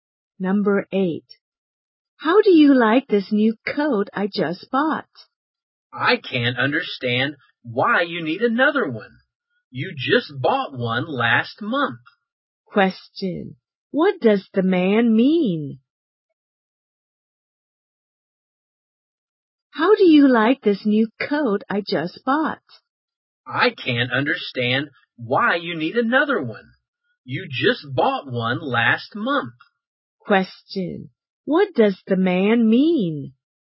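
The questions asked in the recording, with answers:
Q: What does the man mean?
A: The woman doesn't need another coat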